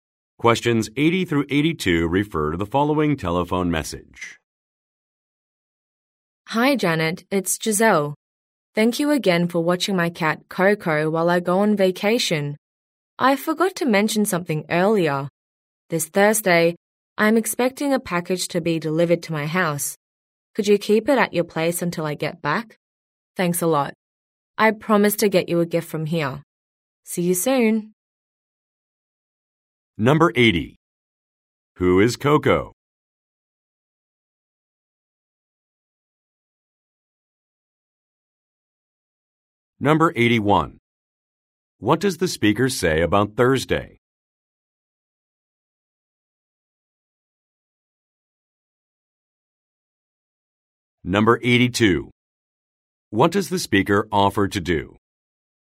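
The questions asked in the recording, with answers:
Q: Who is Coco?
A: A cat

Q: What does the speaker say about Thursday?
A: A package will be delivered

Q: What does the speaker offer to do?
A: Get her a gift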